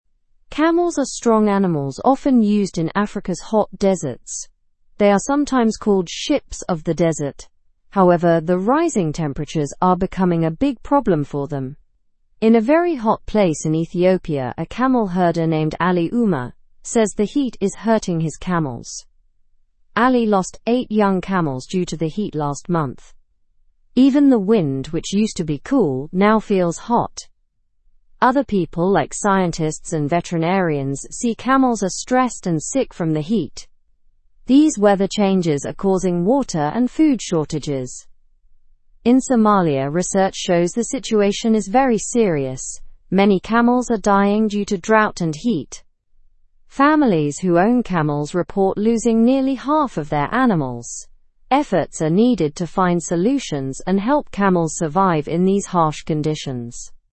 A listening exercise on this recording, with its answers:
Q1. What nickname is given to camels in the desert?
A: Ships of the desert.

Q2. What is causing problems for camels according to the article?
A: Rising temperatures.

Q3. Who is Ali Umer?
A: A camel herder in Ethiopia.

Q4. How many young camels did Ali lose last month?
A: Eight young camels.

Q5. What do scientists and veterinarians notice about camels?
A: They notice camels are stressed and sick from the heat.

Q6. What are some effects of weather changes besides heat?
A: Water and food shortages.

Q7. How are camels in Somalia affected by the heat?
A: Many camels are dying due to drought and heat.

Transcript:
Camels are strong animals often used in Africa's hot deserts. They are sometimes called ships of the desert. However, the rising temperatures are becoming a big problem for them. In a very hot place in Ethiopia, a camel herder named Ali Umer says the heat is hurting his camels.
Ali lost eight young camels due to the heat last month. Even the wind, which used to be cool, now feels hot. Other people like scientists and veterinarians see camels are stressed and sick from the heat. These weather changes are causing water and food shortages.
In Somalia, research shows the situation is very serious. Many camels are dying due to drought and heat. Families who own camels report losing nearly half of their animals. Efforts are needed to find solutions and help camels survive in these harsh conditions.

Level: Level 2